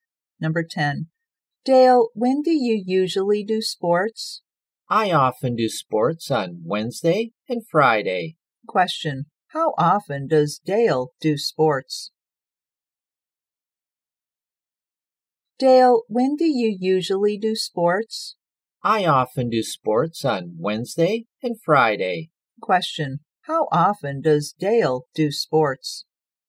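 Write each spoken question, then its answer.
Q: Question. How often does Dale do sports?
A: Twice a week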